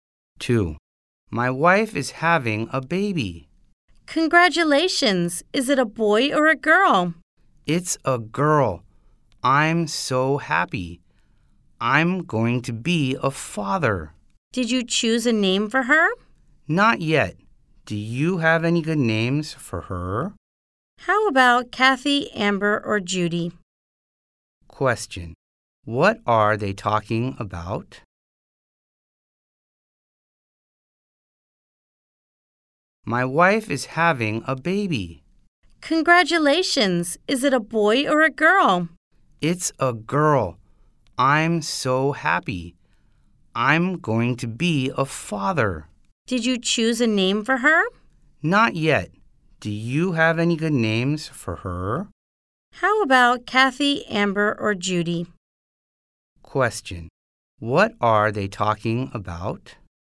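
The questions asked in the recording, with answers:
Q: Question. What are they talking about?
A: A name for the new baby girl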